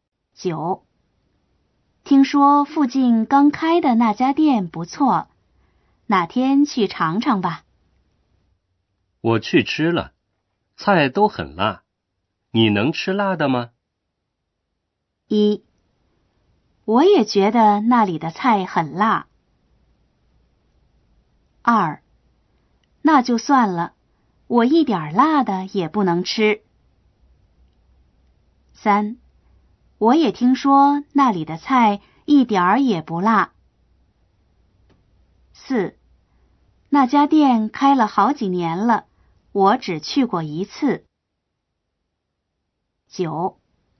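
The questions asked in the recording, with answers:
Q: 我去吃了,菜都很辣,你能吃辣的吗?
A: 2: 那就算了,我一点辣的也不能吃。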